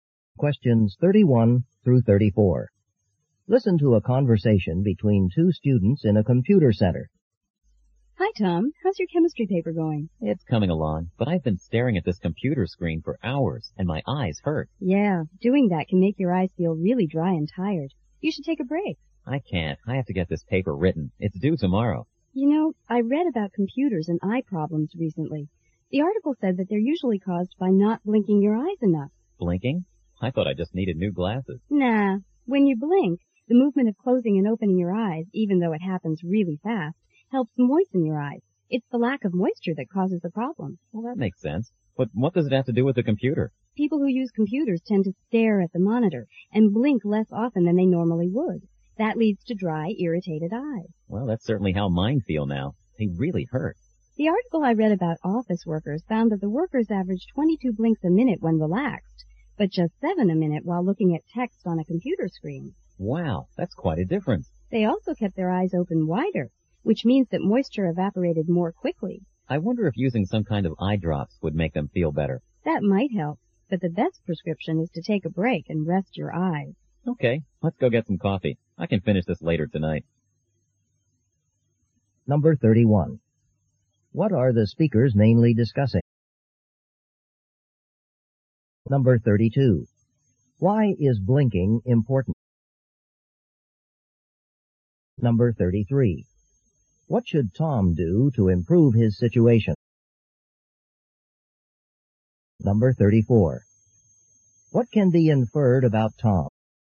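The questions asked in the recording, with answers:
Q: What are the speakers mainly discussing?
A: Eye problems caused by using computers

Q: Why is blinking important?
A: It moistens the eyes

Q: What should Tom do to improve his situation?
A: Take a break and rest his eyes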